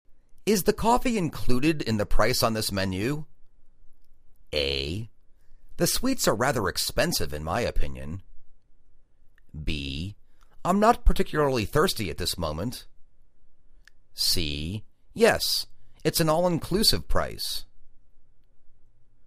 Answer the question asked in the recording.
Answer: Yes, it's an all inclusive price.